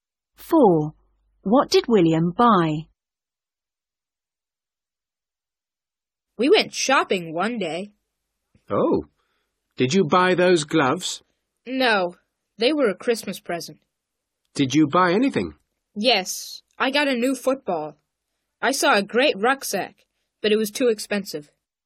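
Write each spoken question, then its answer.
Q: What did William buy?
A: A new football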